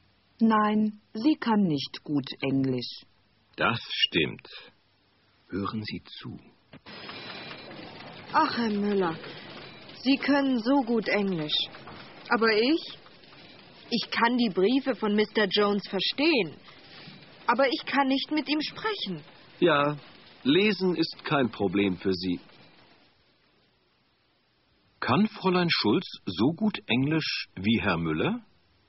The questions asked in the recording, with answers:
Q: Kann Fräulein Schulz so gut Englisch wie Herr Müller?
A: Nein, sie kann nicht so gut Englisch wie er.